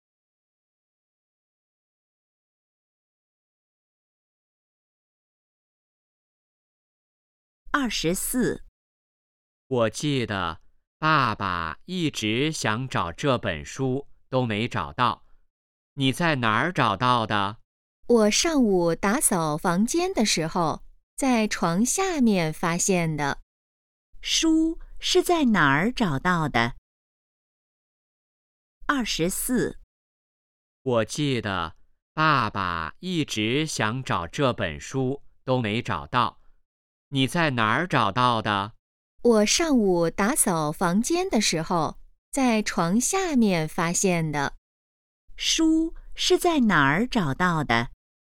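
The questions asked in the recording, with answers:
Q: 书是在哪儿找到的?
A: 床下面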